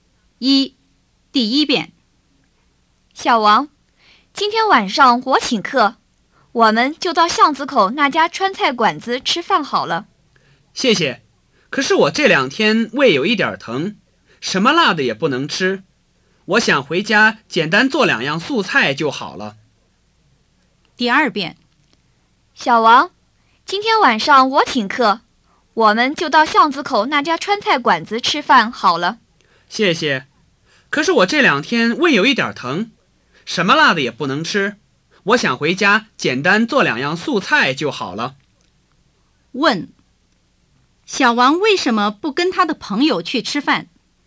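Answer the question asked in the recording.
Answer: 因为他这两天胃疼,什么辣的也不能吃。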